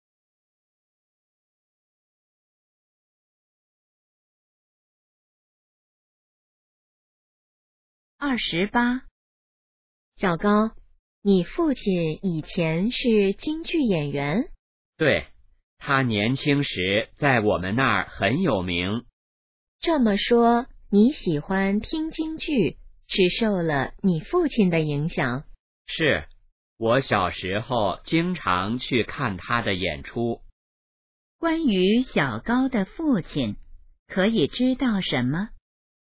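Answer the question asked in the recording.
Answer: 以前是京剧演员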